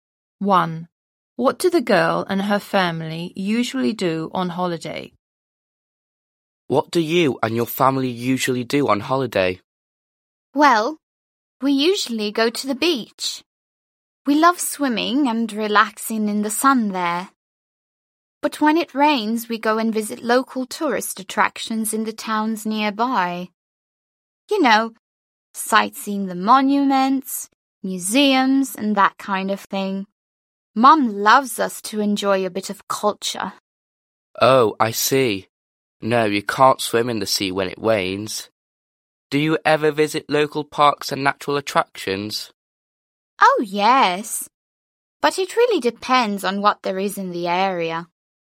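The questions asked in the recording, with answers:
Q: What do the girl and her family usually do on holiday?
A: They go to the beach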